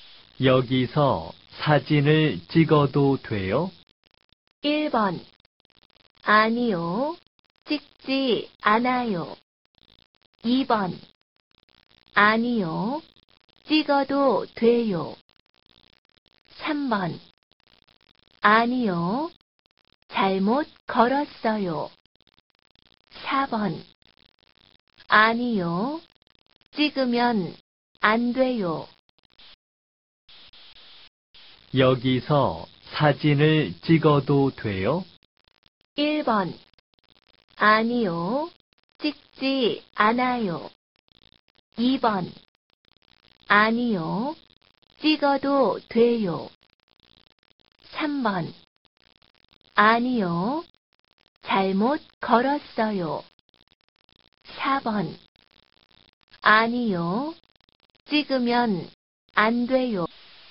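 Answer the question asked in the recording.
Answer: 4: 아니요. 찍으면 안 돼요.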